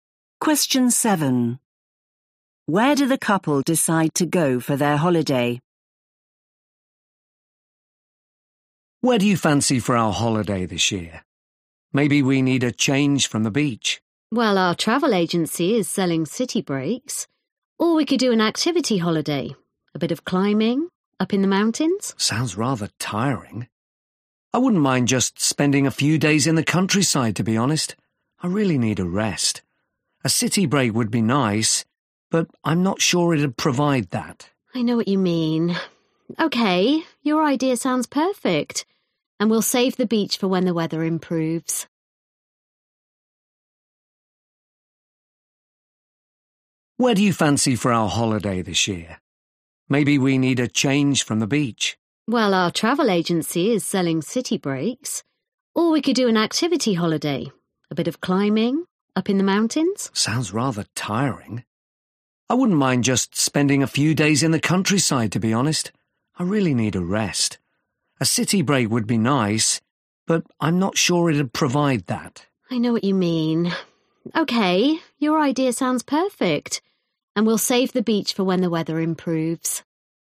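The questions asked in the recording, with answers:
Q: Where do the couple decide to go for their holiday?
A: the countryside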